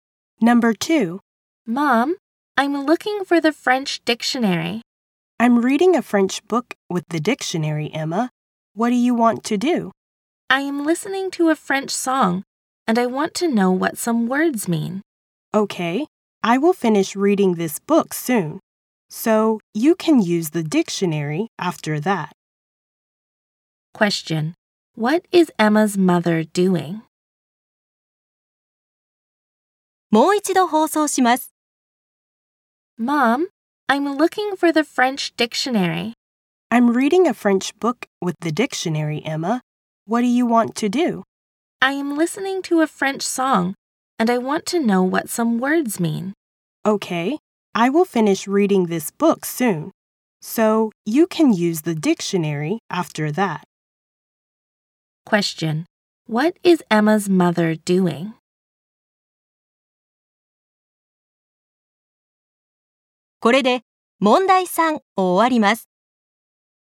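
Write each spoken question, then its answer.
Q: What is Emma's mother doing?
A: Reading a French book with the dictionary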